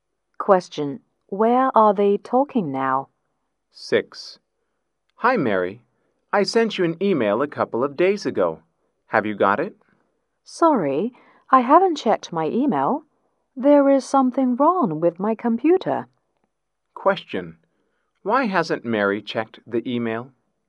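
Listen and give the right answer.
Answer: Something is wrong with her computer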